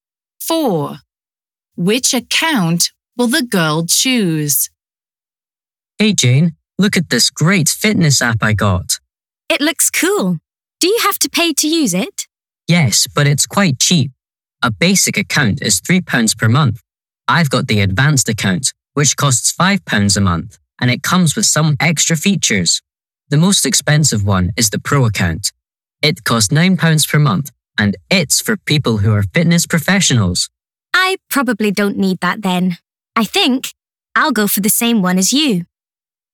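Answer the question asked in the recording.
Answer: the advanced account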